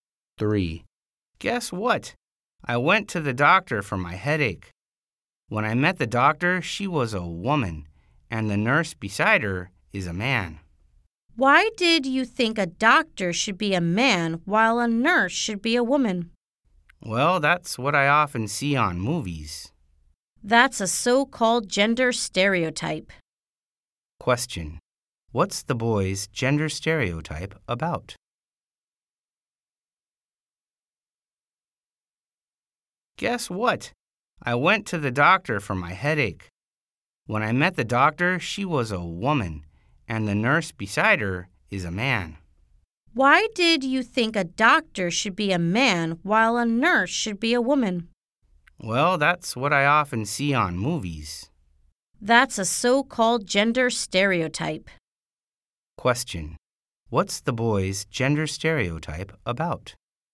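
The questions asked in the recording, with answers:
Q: What's the boy's gender stereotype about?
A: Jobs: doctors should be men and nurses should be women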